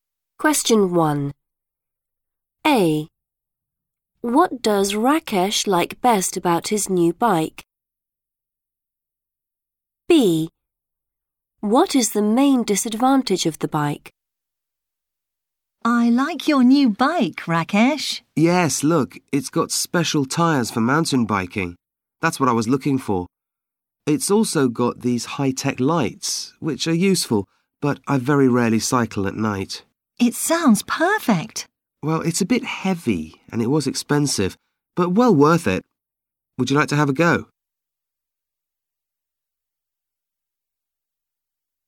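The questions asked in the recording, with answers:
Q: What does Rakesh like best about his new bike?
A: special tyres for mountain biking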